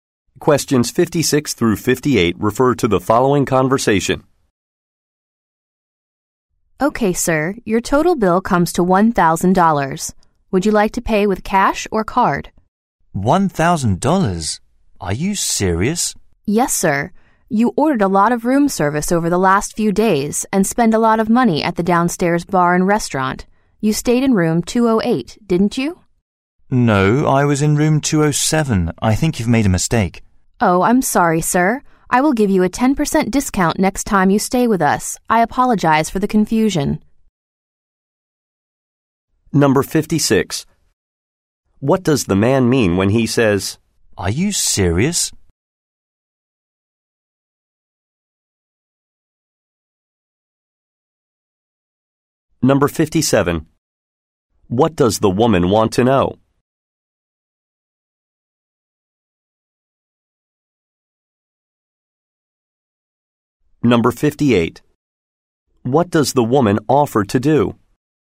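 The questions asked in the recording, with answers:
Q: What does the man mean when he says,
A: He is surprised that the bill is so high

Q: What does the woman offer to do?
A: Give him a 10% discount on his next stay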